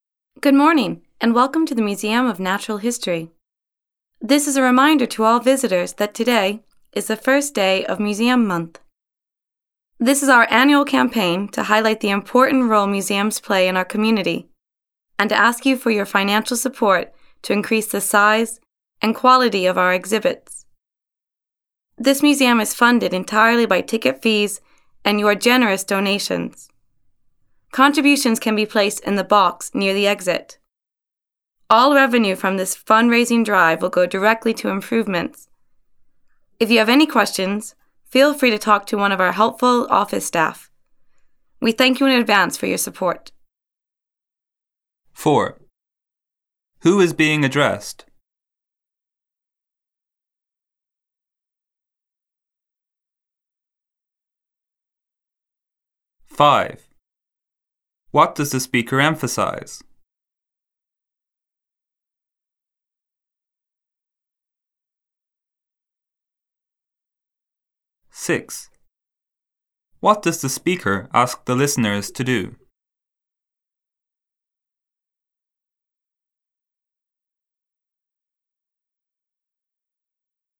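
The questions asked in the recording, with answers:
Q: Who is being addressed?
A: Museum visitors

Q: What does the speaker ask the listeners to do?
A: Make a donation to support the museum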